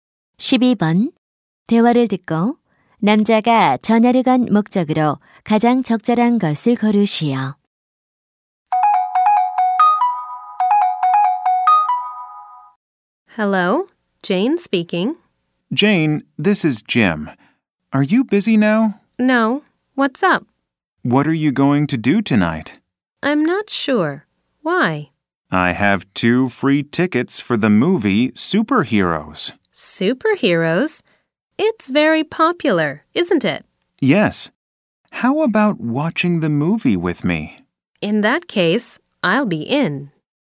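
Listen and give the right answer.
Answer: 함께 영화 보자고 제안하려고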